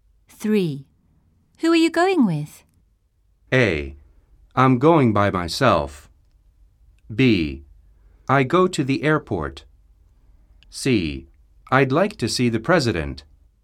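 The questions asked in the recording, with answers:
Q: Who are you going with?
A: A: I'm going by myself.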